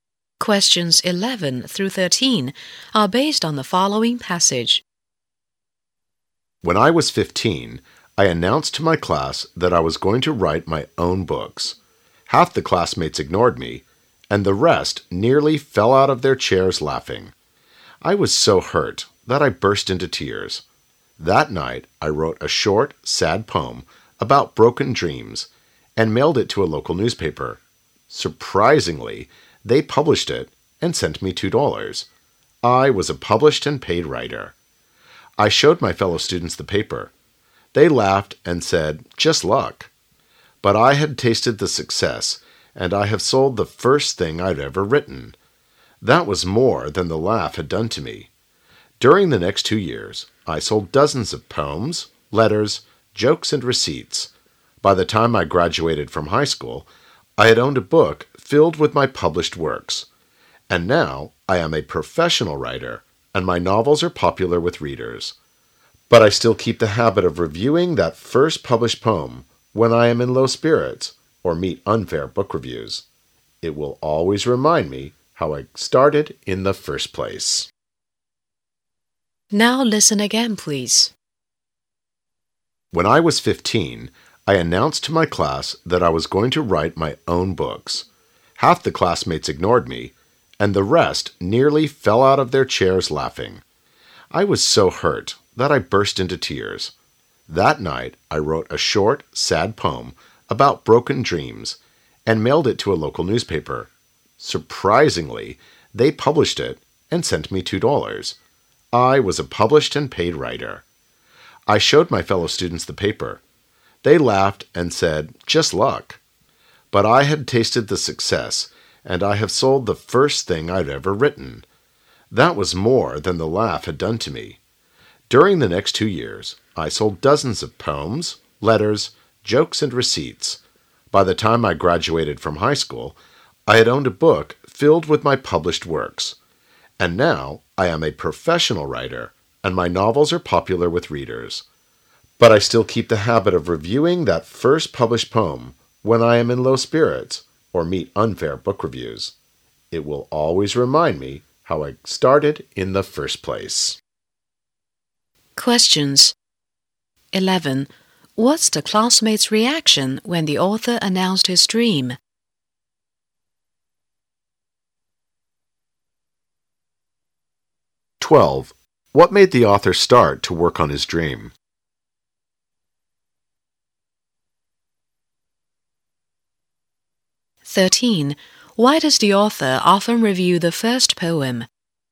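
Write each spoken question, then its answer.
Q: What's the classmate's reaction when the author announced his dream?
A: Half ignored him and the rest laughed at him

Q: What made the author start to work on his dream?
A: His first poem was published and he was paid for it

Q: Why does the author often review the first poem?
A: To remind himself how he started when he is in low spirits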